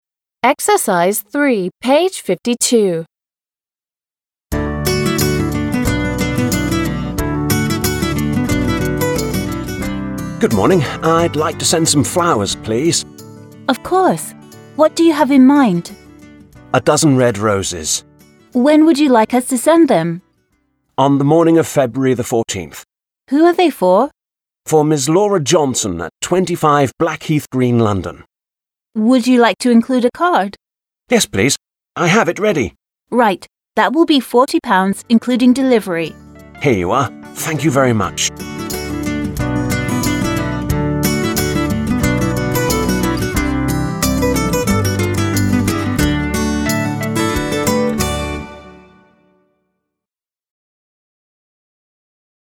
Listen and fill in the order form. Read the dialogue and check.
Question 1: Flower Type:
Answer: Rose

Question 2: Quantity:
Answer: a dozen

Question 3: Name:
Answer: Ms Laura Johnson

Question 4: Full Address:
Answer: 25 Blackheath Green, London

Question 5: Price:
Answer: £40

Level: 6 класс